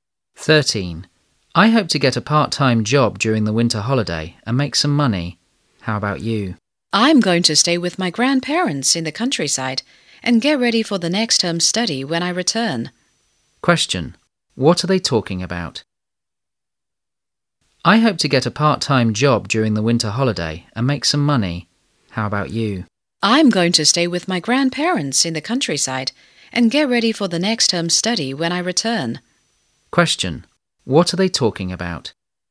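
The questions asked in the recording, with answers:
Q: What are they talking about?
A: Their plans for the winter holiday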